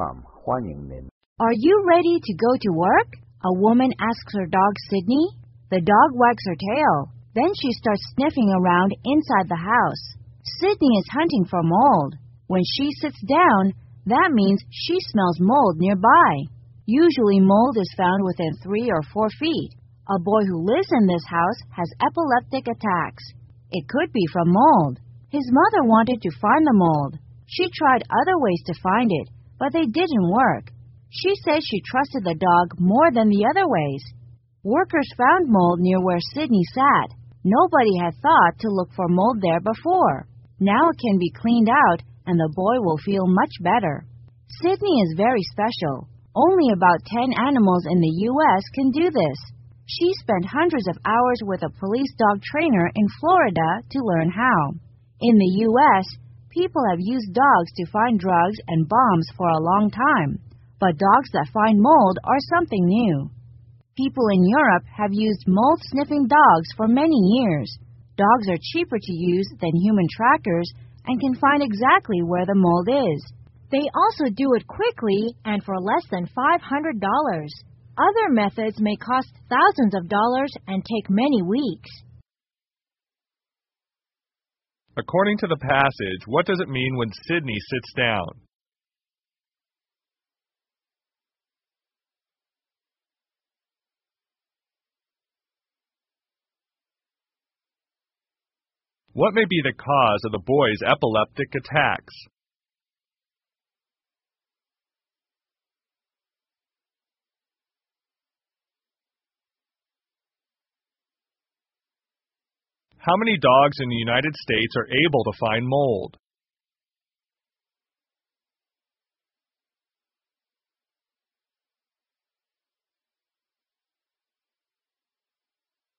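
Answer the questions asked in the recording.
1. She smells mold nearby.
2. Mold.
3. About 10.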